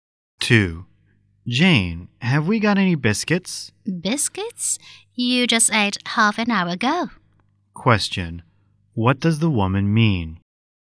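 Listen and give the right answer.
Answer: He shouldn't be hungry; he ate half an hour ago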